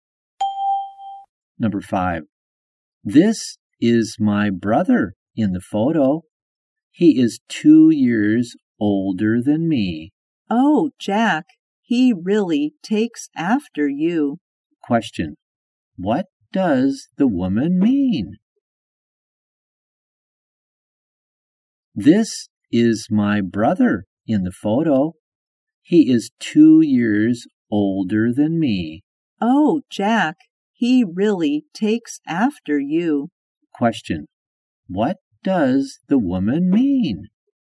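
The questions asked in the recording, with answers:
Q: Question, what does the woman mean?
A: Jack's brother looks like Jack.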